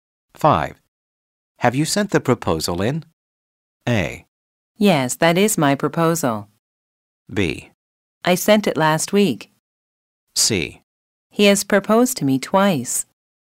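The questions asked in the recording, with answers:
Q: Have you sent the proposal in?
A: B: I sent it last week.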